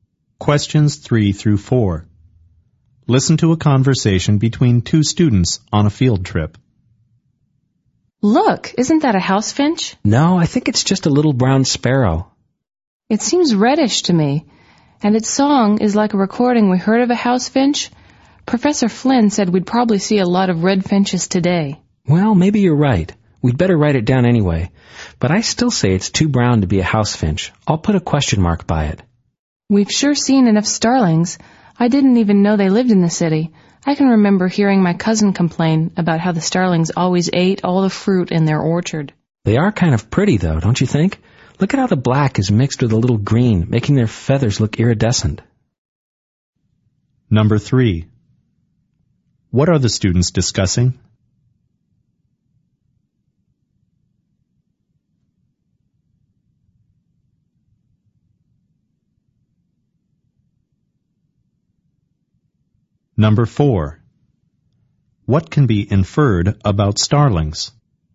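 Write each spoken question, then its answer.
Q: What are the students discussing?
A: The birds they are seeing on the field trip.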